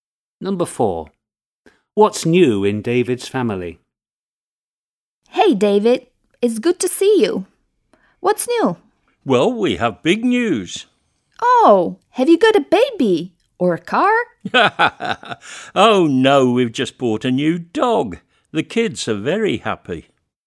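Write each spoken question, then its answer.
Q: What's new in David's family?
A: a new dog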